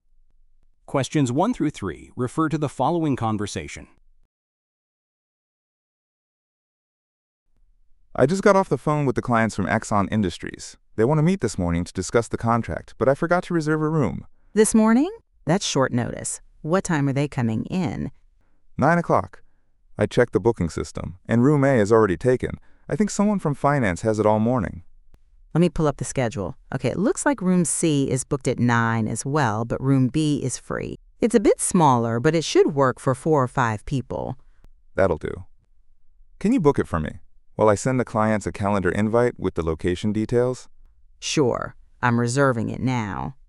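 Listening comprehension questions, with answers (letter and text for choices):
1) Why do the speakers need a meeting room?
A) To interview a job candidate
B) To conduct employee training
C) To meet with clients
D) To hold a staff meeting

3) What will the man do next?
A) Send meeting details to the clients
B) Print copies of the contract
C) Order refreshments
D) Reserve additional equipment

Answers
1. C) To meet with clients
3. A) Send meeting details to the clients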